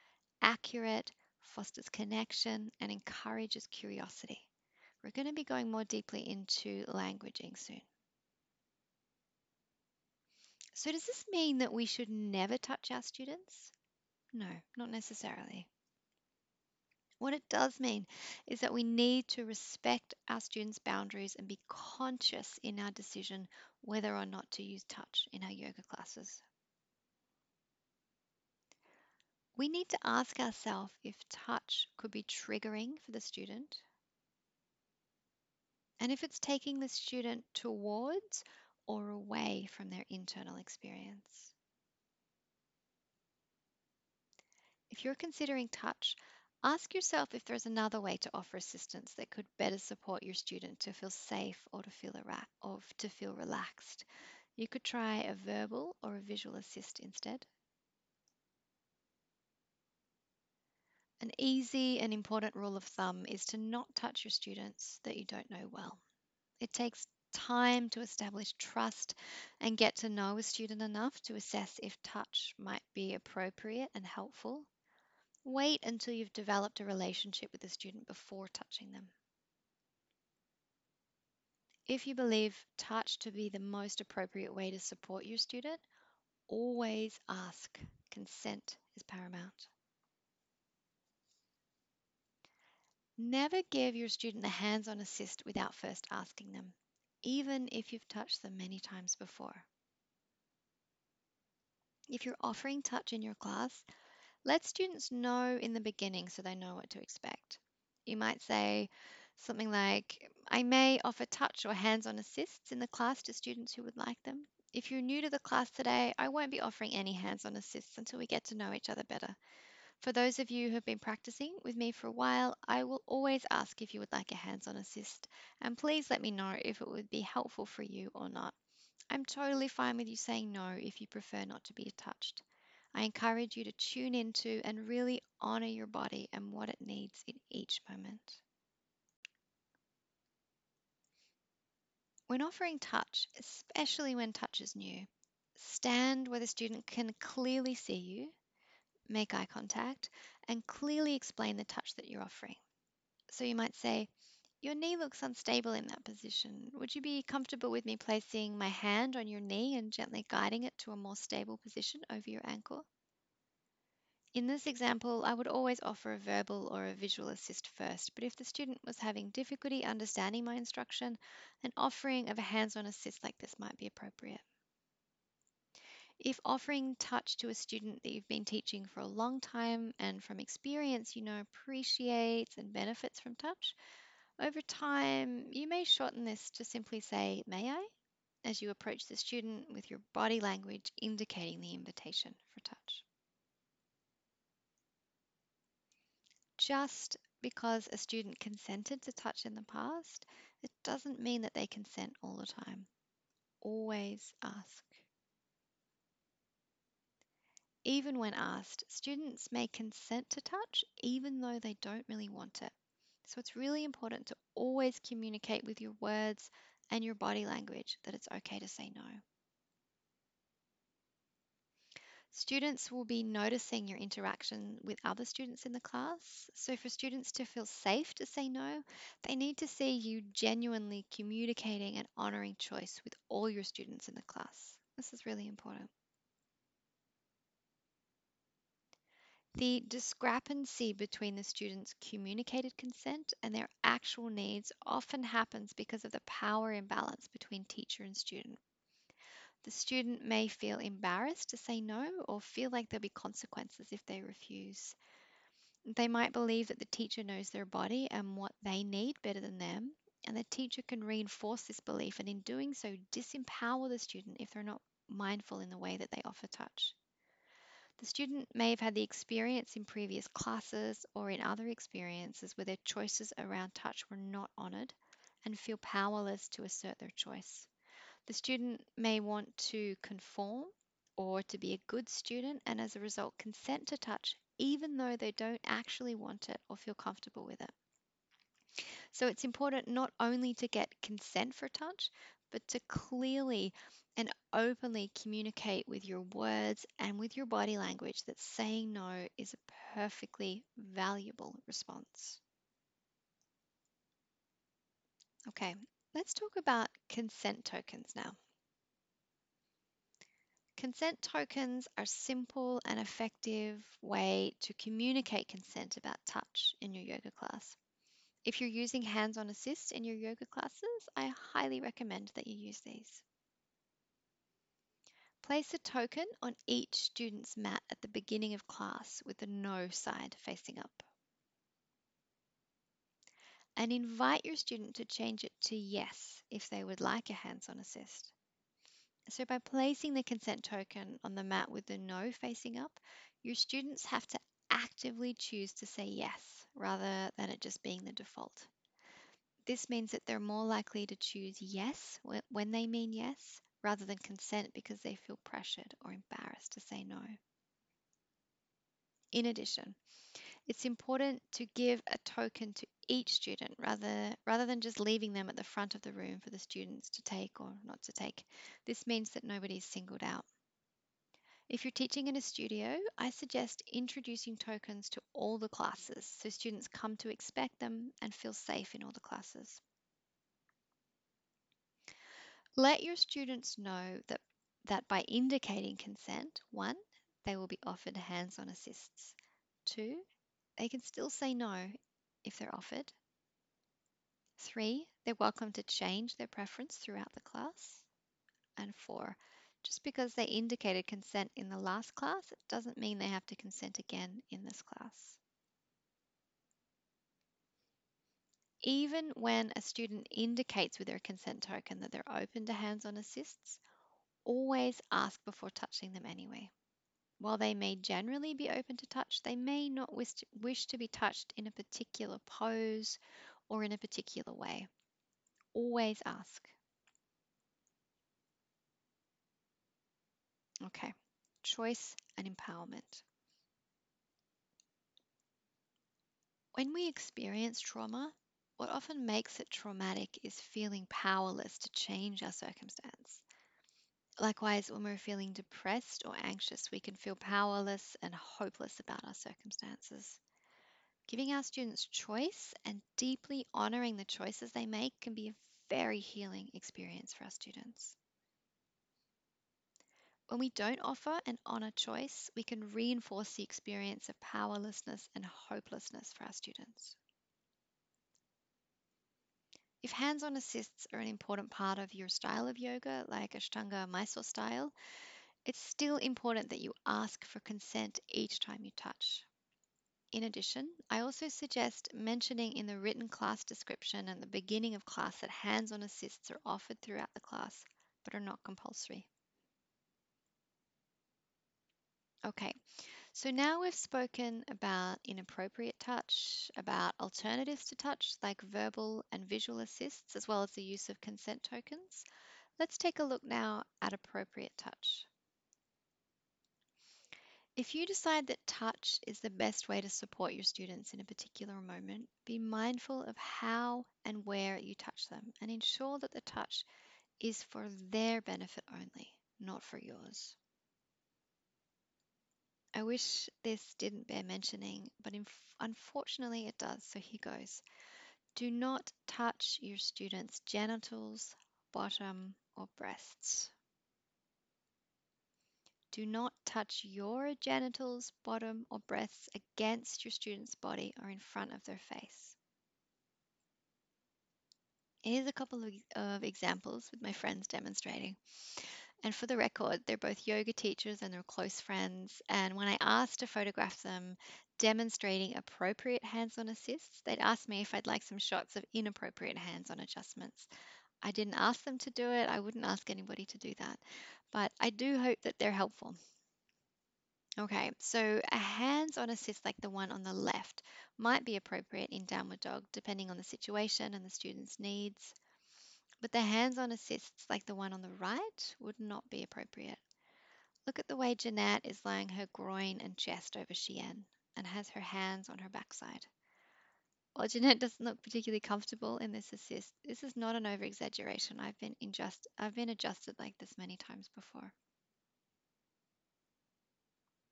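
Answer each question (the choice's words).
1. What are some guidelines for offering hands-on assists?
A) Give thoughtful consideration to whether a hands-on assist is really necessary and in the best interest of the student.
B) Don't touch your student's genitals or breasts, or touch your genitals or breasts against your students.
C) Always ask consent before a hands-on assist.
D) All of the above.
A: All of the above.

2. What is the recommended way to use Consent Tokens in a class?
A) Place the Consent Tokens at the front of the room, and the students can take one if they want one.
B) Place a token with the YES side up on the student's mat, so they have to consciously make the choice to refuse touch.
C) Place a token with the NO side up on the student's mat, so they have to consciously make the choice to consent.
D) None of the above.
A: Place a token with the NO side up on the student's mat, so they have to consciously make the choice to consent.

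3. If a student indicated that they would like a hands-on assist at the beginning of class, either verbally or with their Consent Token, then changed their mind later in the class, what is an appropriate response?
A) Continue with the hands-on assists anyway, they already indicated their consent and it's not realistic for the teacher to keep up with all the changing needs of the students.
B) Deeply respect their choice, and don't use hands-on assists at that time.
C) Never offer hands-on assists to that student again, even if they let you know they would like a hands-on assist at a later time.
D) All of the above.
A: Deeply respect their choice, and don't use hands-on assists at that time.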